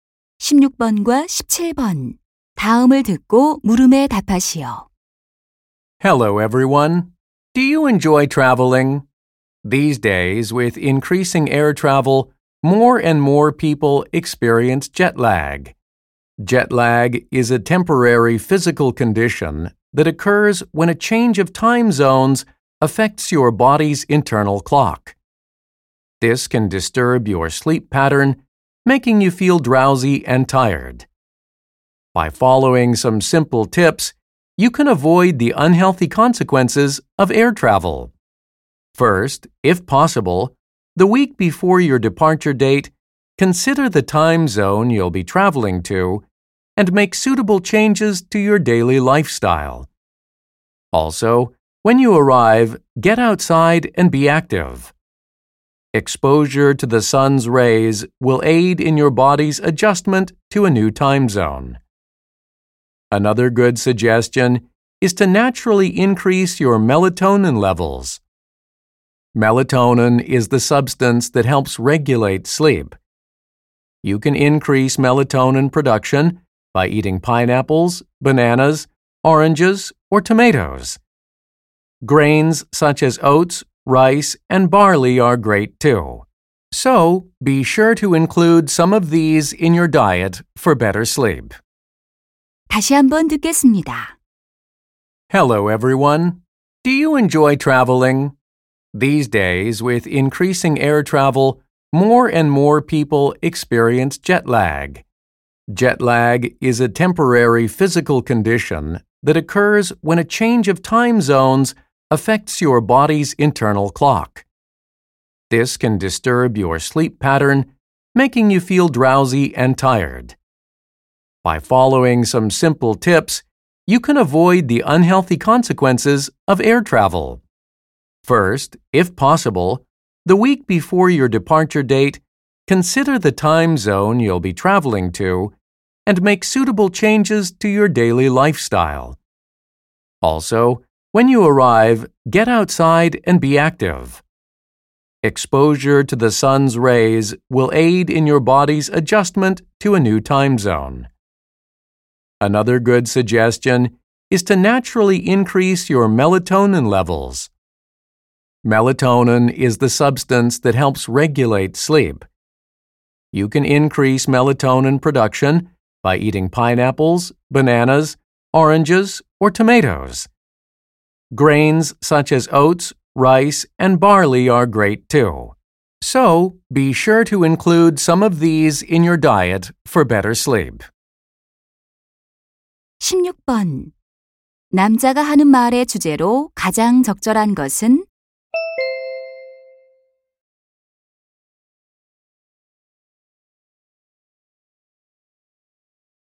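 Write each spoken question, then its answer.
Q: 남자가 하는 말의 주제로 가장 적절한 것은?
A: 시차증을 피하는 방법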